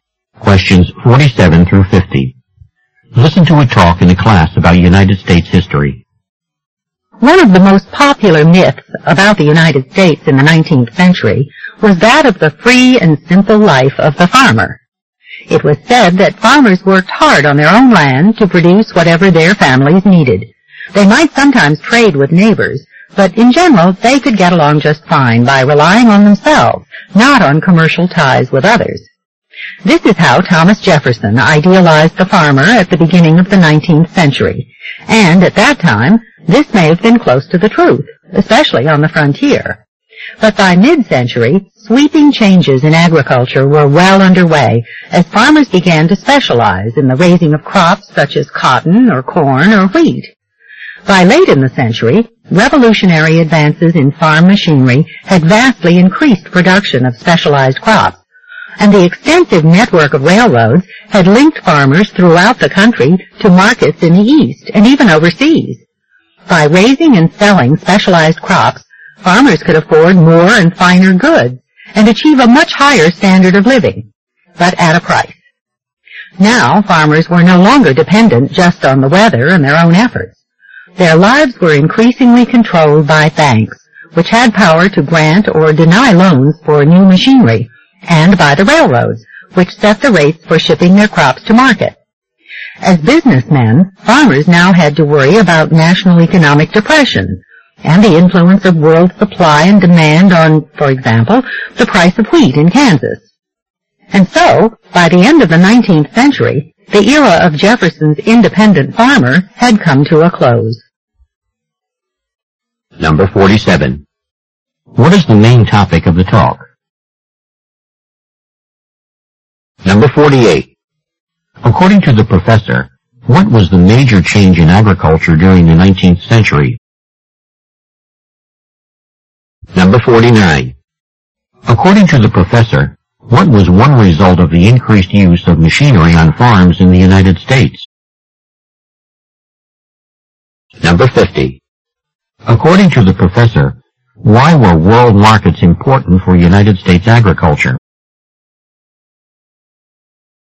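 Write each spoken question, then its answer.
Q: What is the main topic of the talk?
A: How farming in the U.S. changed in the 19th century

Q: According to the professor, what was the major change in agriculture during the 19th century?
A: Farmers began to specialize in particular crops

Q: According to the professor, what was one result of the increased use of machinery on farms in the United States?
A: Much greater production of specialized crops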